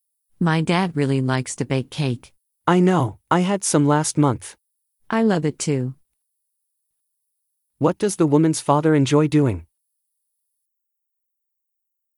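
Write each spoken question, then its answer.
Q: What does the woman's father enjoy doing?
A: Baking cake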